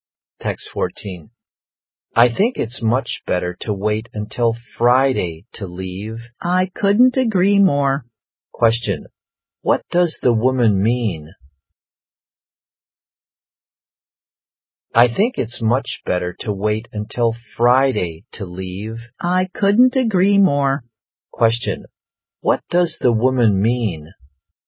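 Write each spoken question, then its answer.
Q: What does the woman mean?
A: She agrees it's better to wait until Friday to leave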